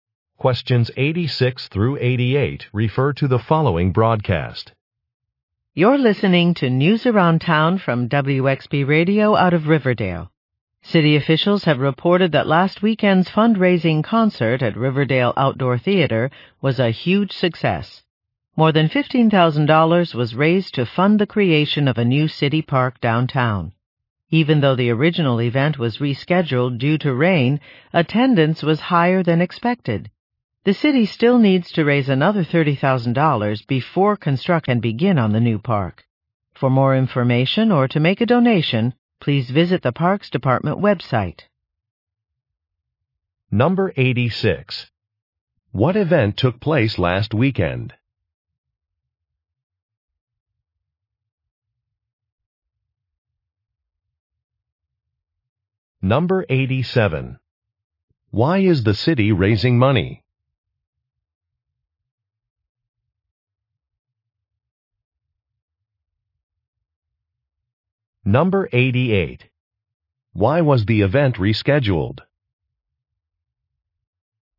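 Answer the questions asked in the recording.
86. A fundraising concert
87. To build a new city park downtown
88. Because of rain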